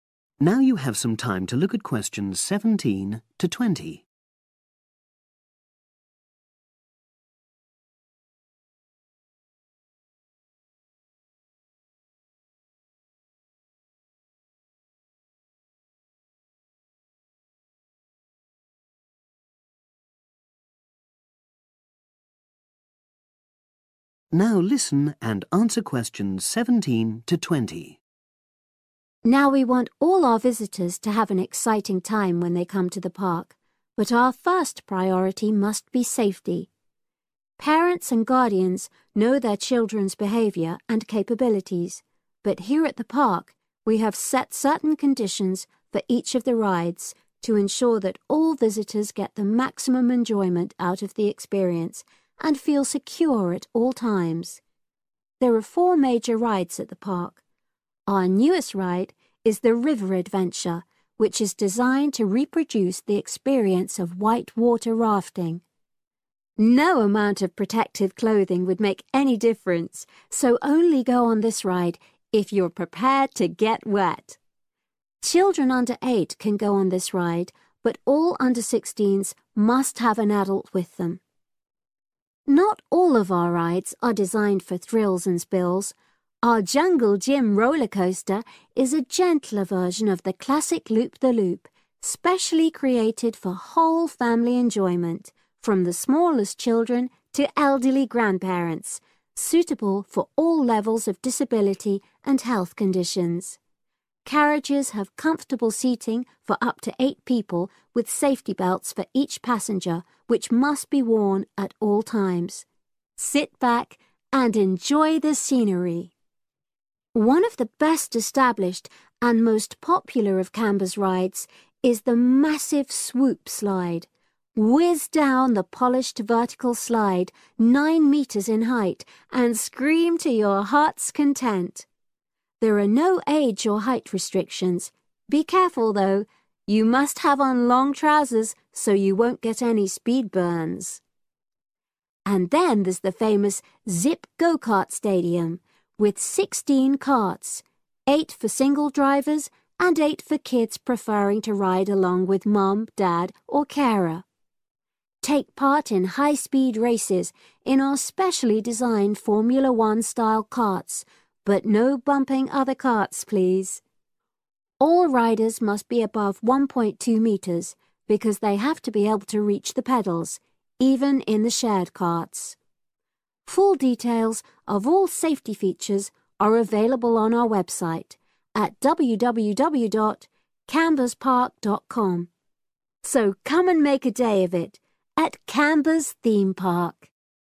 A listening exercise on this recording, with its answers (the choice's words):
Choose FOUR answers from the box and write the correct letter, A-F, next to the questions 7-10.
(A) Must be over a certain age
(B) Must use special safety equipment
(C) Must avoid it if they have health problems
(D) Must wear a particular type of clothing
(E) Must be over a certain height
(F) Must be accompanied by an adult if under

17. River Adventure...............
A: Must be accompanied by an adult if under

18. Jungle Jim Rollercoaster...............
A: Must use special safety equipment

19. Swoop Slide...............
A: Must wear a particular type of clothing

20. Zip Go-carts...............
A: Must be over a certain height